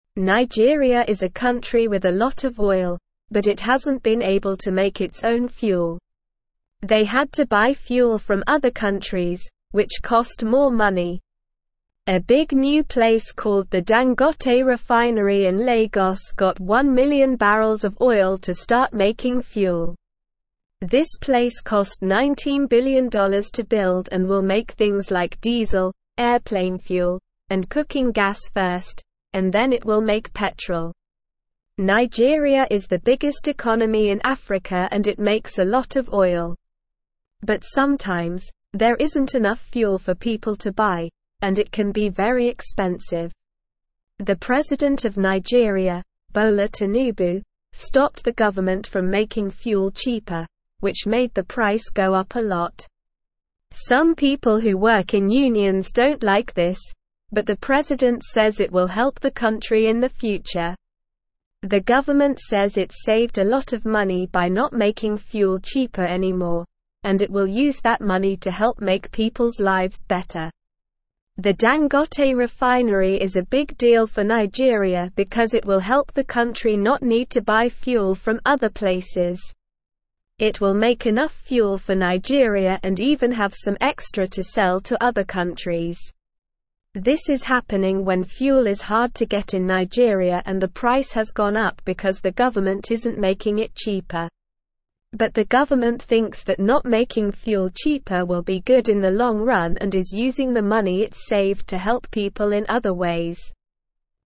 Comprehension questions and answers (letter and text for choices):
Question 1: How much did it cost to build the Dangote refinery?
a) $19 billion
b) $1 million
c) $100 million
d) $10 billion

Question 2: What will the Dangote refinery make first?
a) Petrol, diesel, and cooking gas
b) Petrol, airplane fuel, and diesel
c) Diesel, airplane fuel, and cooking gas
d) Cooking gas, petrol, and airplane fuel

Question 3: What is the president of Nigeria's name?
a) Bola Tinubu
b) Dangote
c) Lagos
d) Nigeria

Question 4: Why did the president stop the government from making fuel cheaper?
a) He wants to make more money.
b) He doesn't like unions.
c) He wants to buy fuel from other countries.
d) He thinks it will help the country in the future.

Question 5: What will the Dangote refinery do for Nigeria?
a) It will make fuel more expensive in Nigeria.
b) It will make Nigeria's economy smaller.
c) It will help Nigeria not need to buy fuel from other places.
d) It will make Nigeria's economy bigger.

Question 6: Why is fuel hard to get in Nigeria?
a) The Dangote refinery is not working.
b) Nigeria doesn't have any oil.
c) Other countries are buying all the fuel.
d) The government is not making it cheaper.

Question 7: What is the government doing with the money it saved?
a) Buying more fuel from other countries.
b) Using it to help people in other ways.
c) Building another refinery.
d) Making fuel cheaper.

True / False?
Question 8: The government believes that not making fuel cheaper will benefit the country in the long run and is using the saved money to help people in other ways.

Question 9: Nigeria is not the biggest economy in Africa and produces a lot of oil.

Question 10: Nigeria is a country that has a lot of oil, but it couldn't make its own fuel before.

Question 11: The Dangote refinery will not help Nigeria become self-sufficient in fuel and even have extra to sell to other countries.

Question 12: Sometimes, there isn't enough fuel in Nigeria and it can be very expensive.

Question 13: The refinery cost $19 billion to build and will not make diesel, airplane fuel, cooking gas, and petrol.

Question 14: The Dangote refinery in Lagos is not a new place that will make fuel from oil.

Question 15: The president of Nigeria, Bola Tinubu, stopped the government from making fuel cheaper.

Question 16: This place cost $19 billion to (1)______ and will make (2)______ like (3)______, airplane fuel, and cooking gas first, and then it will (4)______ petrol.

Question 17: This place cost $19 billion to (1)______ and will make (2)______ like (3)______, airplane fuel, and cooking gas first, and then it will (4)______ petrol.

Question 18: This place cost $19 billion to (1)______ and will make (2)______ like (3)______, airplane fuel, and cooking gas first, and then it will (4)______ petrol.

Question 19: (5)______ is the biggest (6)______ in Africa and it makes a lot of oil.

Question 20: (5)______ is the biggest (6)______ in Africa and it makes a lot of oil.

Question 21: Some people who work in unions don't like this, but the president says it will (7)______ the country in the future.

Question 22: The government says it saved a lot of money by not (8)______ fuel cheaper anymore, and it will use that money to help make people's lives better.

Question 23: The Dangote (9)______ is a big deal for Nigeria because it will help the country not need to buy fuel from other places.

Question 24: This is (10)______ when fuel is (11)______ to get in Nigeria and the price has gone up because the government isn't making it cheaper.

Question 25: This is (10)______ when fuel is (11)______ to get in Nigeria and the price has gone up because the government isn't making it cheaper.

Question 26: But the government thinks that not making fuel cheaper will be good in the (12)______ run and is using the money it saved to help people in other ways.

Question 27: What is the name of the big new place in Lagos that is making fuel?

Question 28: What things will the Dangote refinery make first?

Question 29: Why did the price of fuel go up a lot?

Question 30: How is the government using the money it saved by not making fuel cheaper?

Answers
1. a) $19 billion
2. c) Diesel, airplane fuel, and cooking gas
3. a) Bola Tinubu
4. d) He thinks it will help the country in the future.
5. c) It will help Nigeria not need to buy fuel from other places.
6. d) The government is not making it cheaper.
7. b) Using it to help people in other ways.
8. True
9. False
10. True
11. False
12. True
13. False
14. False
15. True
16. build
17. things
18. diesel
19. Nigeria
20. economy
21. help
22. making
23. refinery
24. happening
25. hard
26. long
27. The big new place in Lagos that is making fuel is called the Dangote refinery.
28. The Dangote refinery will first make things like diesel, airplane fuel, and cooking gas.
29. The price of fuel went up a lot because the president stopped the government from making it cheaper.
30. The government is using the money it saved by not making fuel cheaper to help people in other ways and make their lives better.

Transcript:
Nigeria is a country with a lot of oil, but it hasn't been able to make its own fuel. They had to buy fuel from other countries, which cost more money. A big new place called the Dangote refinery in Lagos got one million barrels of oil to start making fuel. This place cost $19 billion to build and will make things like diesel, airplane fuel, and cooking gas first, and then it will make petrol.
Nigeria is the biggest economy in Africa and it makes a lot of oil. But sometimes, there isn't enough fuel for people to buy, and it can be very expensive. The president of Nigeria, Bola Tinubu, stopped the government from making fuel cheaper, which made the price go up a lot. Some people who work in unions don't like this, but the president says it will help the country in the future. The government says it saved a lot of money by not making fuel cheaper anymore, and it will use that money to help make people's lives better.
The Dangote refinery is a big deal for Nigeria because it will help the country not need to buy fuel from other places. It will make enough fuel for Nigeria and even have some extra to sell to other countries. This is happening when fuel is hard to get in Nigeria and the price has gone up because the government isn't making it cheaper. But the government thinks that not making fuel cheaper will be good in the long run and is using the money it saved to help people in other ways.

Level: Level 2